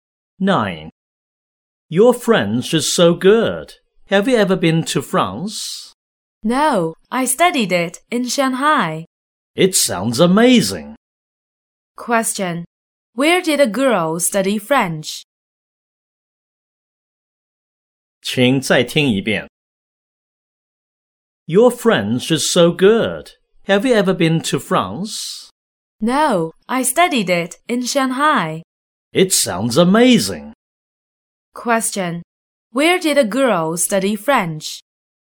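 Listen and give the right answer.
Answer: In Shanghai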